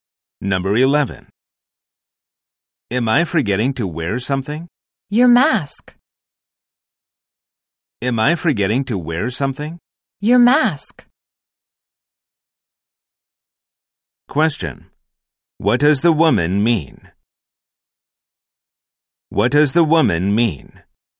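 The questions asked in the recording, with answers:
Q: What does the woman mean?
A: He is forgetting to wear his mask.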